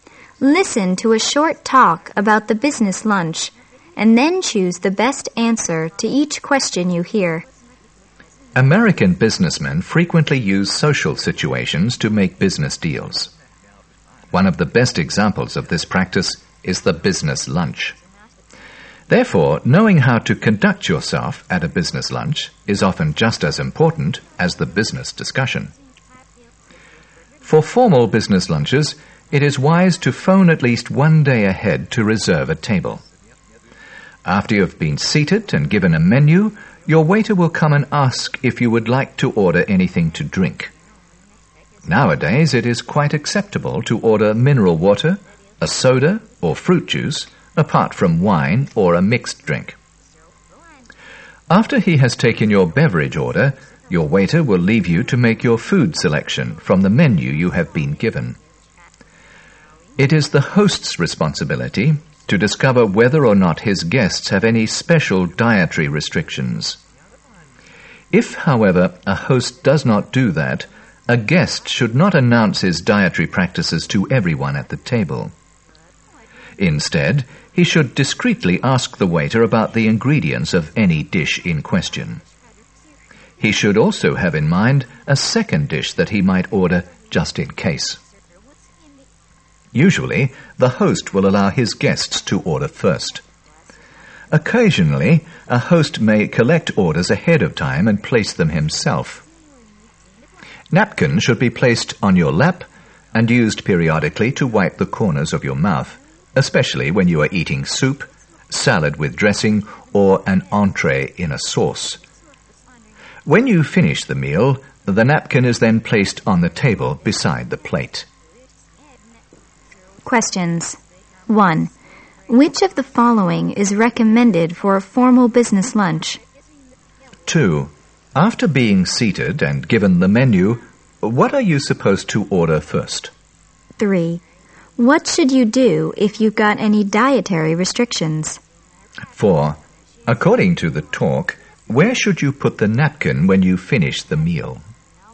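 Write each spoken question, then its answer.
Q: After being seated and given the menu, what are you supposed to order first?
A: Drinks

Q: What should you do if you've got any dietary restrictions?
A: Discreetly ask the waiter about the ingredients of the dish

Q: According to the talk, where should you put the napkin when you finish the meal?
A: On the table beside the plate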